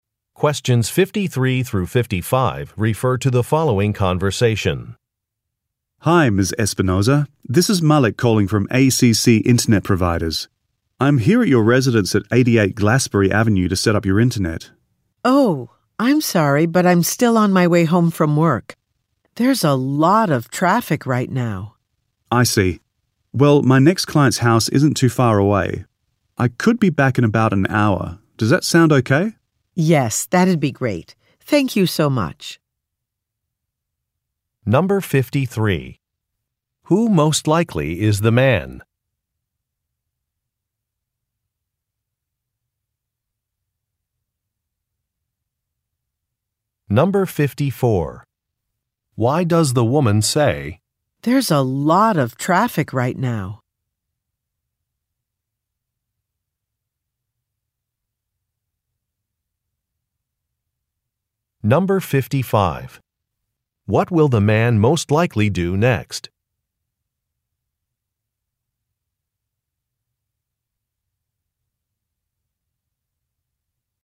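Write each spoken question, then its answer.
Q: Who most likely is the man?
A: An internet installation technician

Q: Why does the woman say, "There's a lot of traffic right now"?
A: To explain why she will be late getting home

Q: What will the man most likely do next?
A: Go to his next client's house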